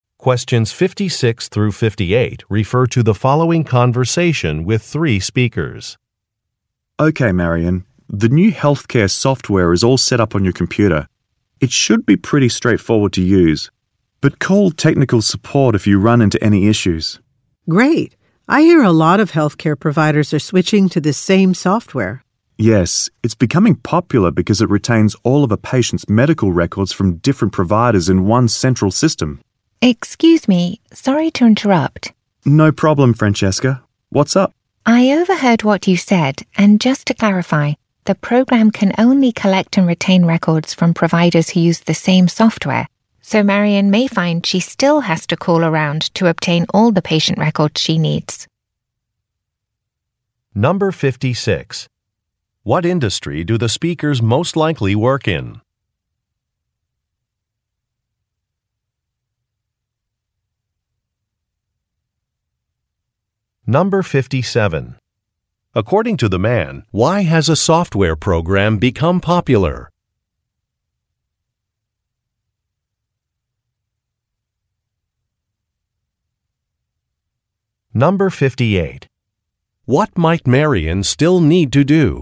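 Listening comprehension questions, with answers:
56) What industry do the speakers most likely work in?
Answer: Medicine

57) According to the man, why has a software program become popular?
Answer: It makes information more accessible.

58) What might Marion still need to do?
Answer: Contact some service providers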